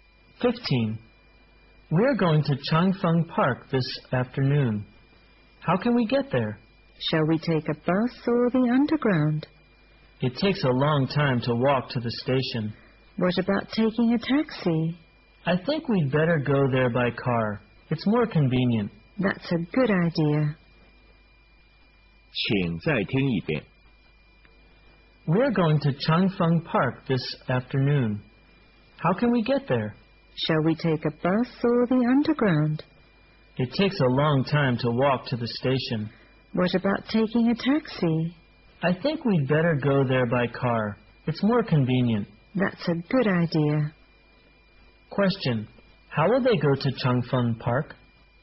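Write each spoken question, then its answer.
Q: How will they go to Changfeng Park?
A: By car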